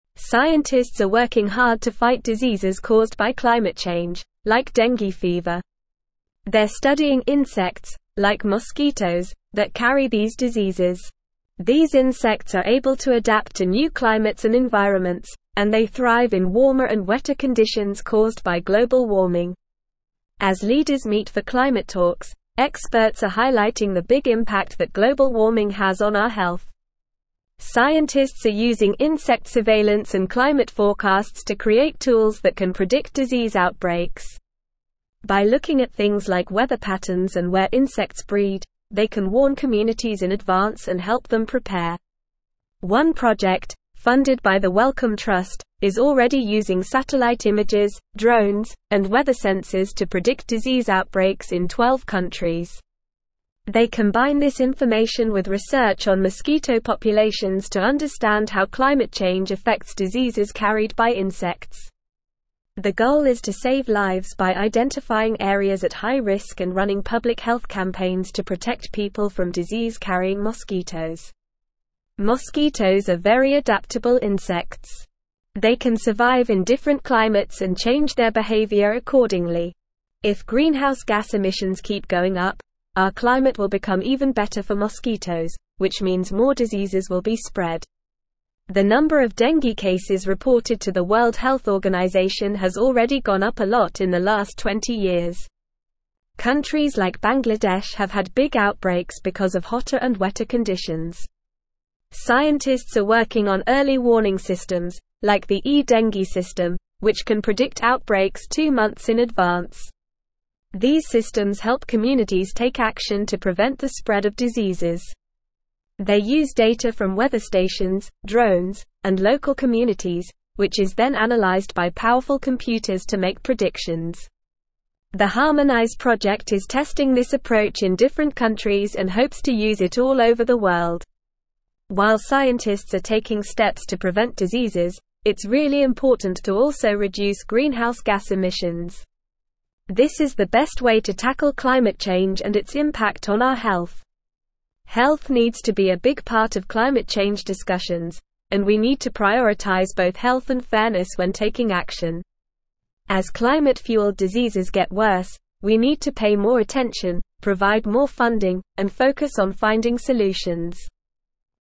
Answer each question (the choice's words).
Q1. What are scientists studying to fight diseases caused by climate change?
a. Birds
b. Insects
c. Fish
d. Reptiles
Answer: Insects

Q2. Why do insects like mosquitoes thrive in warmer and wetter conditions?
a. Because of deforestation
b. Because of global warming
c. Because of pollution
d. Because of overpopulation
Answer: Because of global warming

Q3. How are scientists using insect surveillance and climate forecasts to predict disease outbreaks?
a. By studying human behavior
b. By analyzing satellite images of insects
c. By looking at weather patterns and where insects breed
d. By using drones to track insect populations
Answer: By looking at weather patterns and where insects breed

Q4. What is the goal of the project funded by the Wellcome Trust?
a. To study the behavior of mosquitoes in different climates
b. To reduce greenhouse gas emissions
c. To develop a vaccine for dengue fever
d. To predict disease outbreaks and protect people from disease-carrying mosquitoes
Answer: To predict disease outbreaks and protect people from disease-carrying mosquitoes

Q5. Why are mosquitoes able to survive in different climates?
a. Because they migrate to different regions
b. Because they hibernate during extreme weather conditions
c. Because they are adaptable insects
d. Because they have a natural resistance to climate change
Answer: Because they are adaptable insects

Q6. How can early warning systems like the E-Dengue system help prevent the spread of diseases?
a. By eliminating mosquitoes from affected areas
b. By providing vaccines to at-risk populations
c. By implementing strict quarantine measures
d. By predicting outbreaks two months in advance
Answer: By predicting outbreaks two months in advance

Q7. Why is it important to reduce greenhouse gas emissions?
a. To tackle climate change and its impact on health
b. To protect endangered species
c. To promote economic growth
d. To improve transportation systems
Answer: To tackle climate change and its impact on health

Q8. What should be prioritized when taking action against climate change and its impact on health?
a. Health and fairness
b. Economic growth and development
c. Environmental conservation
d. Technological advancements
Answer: Health and fairness

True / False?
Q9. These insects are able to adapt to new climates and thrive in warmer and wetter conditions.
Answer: True

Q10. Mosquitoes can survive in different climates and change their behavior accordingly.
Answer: True

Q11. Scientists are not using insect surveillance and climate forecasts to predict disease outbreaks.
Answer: False

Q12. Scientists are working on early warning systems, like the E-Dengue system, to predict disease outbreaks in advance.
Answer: True

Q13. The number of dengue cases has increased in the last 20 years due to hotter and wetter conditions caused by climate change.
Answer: True

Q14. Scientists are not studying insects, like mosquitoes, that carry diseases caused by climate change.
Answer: False

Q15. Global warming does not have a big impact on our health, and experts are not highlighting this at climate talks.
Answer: False

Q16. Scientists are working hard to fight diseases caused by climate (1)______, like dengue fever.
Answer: change

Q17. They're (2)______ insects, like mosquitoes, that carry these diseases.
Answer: studying

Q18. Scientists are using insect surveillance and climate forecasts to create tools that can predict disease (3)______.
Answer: outbreaks

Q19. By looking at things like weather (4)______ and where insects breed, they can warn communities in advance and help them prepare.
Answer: patterns

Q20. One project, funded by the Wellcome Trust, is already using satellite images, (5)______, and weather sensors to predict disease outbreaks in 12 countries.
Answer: drones

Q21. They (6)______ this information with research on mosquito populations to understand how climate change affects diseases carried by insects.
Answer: combine

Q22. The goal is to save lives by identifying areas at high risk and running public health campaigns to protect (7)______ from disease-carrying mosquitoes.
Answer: people

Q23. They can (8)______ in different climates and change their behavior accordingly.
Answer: survive

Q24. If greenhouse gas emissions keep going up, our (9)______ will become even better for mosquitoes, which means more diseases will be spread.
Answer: climate

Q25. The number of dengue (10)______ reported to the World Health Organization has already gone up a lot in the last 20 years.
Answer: cases

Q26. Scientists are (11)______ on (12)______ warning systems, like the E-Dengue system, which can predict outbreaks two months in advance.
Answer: working

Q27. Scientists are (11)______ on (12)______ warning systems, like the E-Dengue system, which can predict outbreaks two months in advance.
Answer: early

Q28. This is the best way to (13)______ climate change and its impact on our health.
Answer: tackle

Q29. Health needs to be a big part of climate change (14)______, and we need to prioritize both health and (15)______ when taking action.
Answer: discussions

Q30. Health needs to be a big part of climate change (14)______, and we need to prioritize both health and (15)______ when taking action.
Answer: fairness

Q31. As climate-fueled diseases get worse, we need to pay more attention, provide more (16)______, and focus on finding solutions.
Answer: funding

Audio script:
Scientists are working hard to fight diseases caused by climate change, like dengue fever. They're studying insects, like mosquitoes, that carry these diseases. These insects are able to adapt to new climates and environments, and they thrive in warmer and wetter conditions caused by global warming. As leaders meet for climate talks, experts are highlighting the big impact that global warming has on our health. Scientists are using insect surveillance and climate forecasts to create tools that can predict disease outbreaks. By looking at things like weather patterns and where insects breed, they can warn communities in advance and help them prepare.
One project, funded by the Wellcome Trust, is already using satellite images, drones, and weather sensors to predict disease outbreaks in 12 countries. They combine this information with research on mosquito populations to understand how climate change affects diseases carried by insects. The goal is to save lives by identifying areas at high risk and running public health campaigns to protect people from disease-carrying mosquitoes.
Mosquitoes are very adaptable insects. They can survive in different climates and change their behavior accordingly. If greenhouse gas emissions keep going up, our climate will become even better for mosquitoes, which means more diseases will be spread. The number of dengue cases reported to the World Health Organization has already gone up a lot in the last 20 years. Countries like Bangladesh have had big outbreaks because of hotter and wetter conditions.
Scientists are working on early warning systems, like the E-Dengue system, which can predict outbreaks two months in advance. These systems help communities take action to prevent the spread of diseases. They use data from weather stations, drones, and local communities, which is then analyzed by powerful computers to make predictions. The Harmonize project is testing this approach in different countries and hopes to use it all over the world.
While scientists are taking steps to prevent diseases, it's really important to also reduce greenhouse gas emissions. This is the best way to tackle climate change and its impact on our health. Health needs to be a big part of climate change discussions, and we need to prioritize both health and fairness when taking action. As climate-fueled diseases get worse, we need to pay more attention, provide more funding, and focus on finding solutions.

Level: Level 3